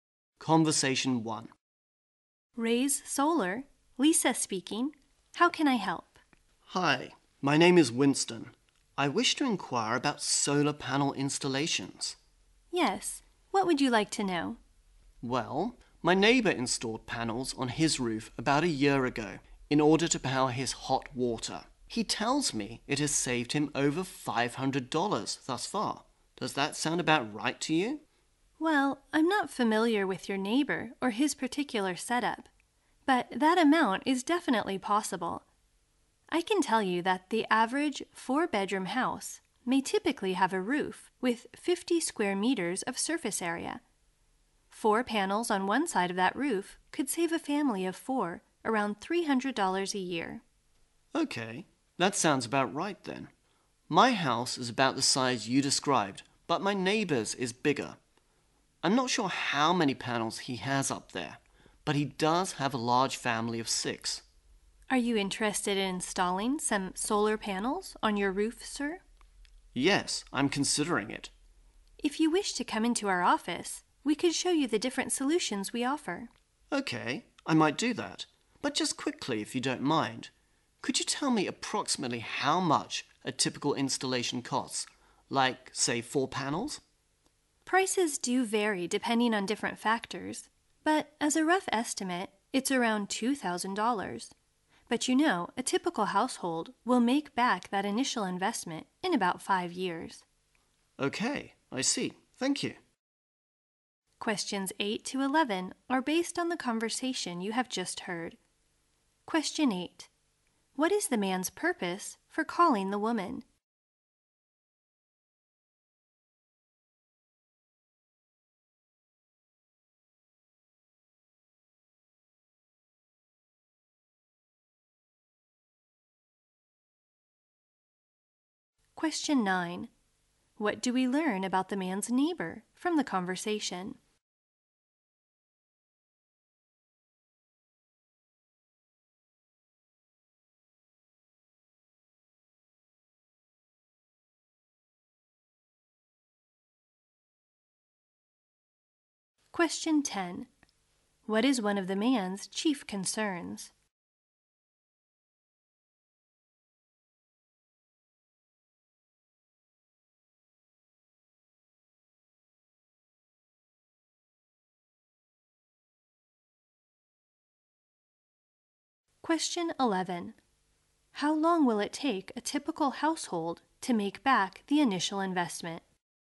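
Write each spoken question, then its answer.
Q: What is the man's purpose for calling the woman?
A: To ask about solar panel installation

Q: What is one of the man's chief concerns?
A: The cost of installation

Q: How long will it take a typical household to make back the initial investment?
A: About 5 years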